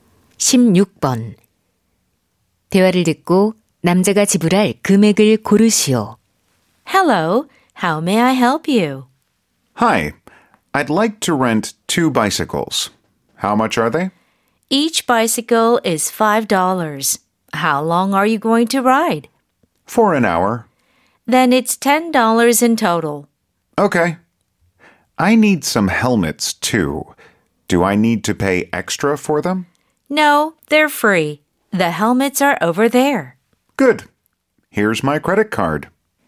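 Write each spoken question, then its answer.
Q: 대화를 듣고 남자가 지불할 금액을 고르시오.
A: $10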